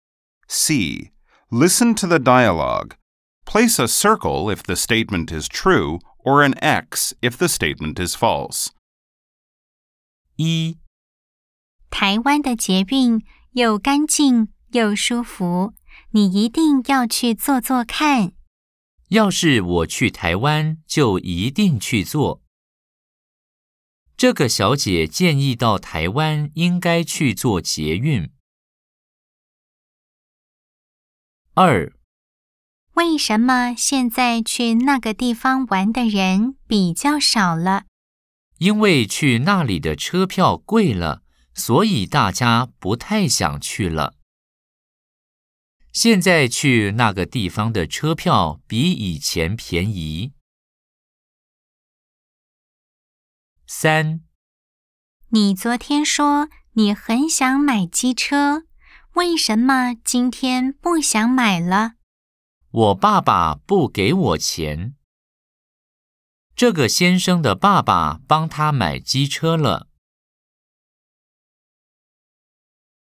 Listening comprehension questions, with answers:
C. Nghe đoạn hội thoại. Đánh dấu ⭕ nếu đúng, ✖ nếu sai.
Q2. 現在去那個地方的車票比以前便宜。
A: X

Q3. 這個先生的爸爸幫他買機車了。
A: X

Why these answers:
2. 為什麼現在去那個地方玩的人比較少了?因為去那裡的車票貴了,所以大家不太想去了。